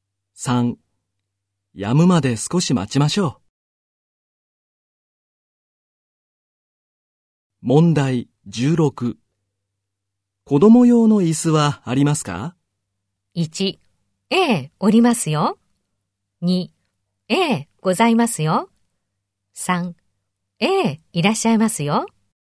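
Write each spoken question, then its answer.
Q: 子供用の椅子はありますか?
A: 2: ええ、ございますよ。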